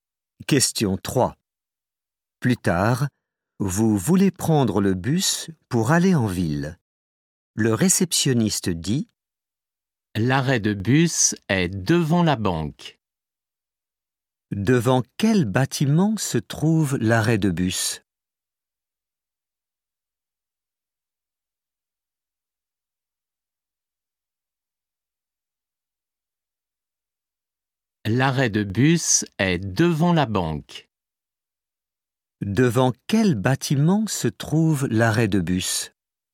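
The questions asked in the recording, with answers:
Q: Devant quel bâtiment se trouve l'arrêt de bus?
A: La banque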